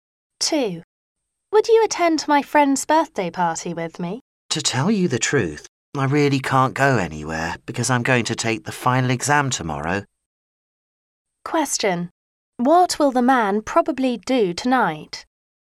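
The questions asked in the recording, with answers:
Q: What will the man probably do tonight?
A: Prepare for his final exam.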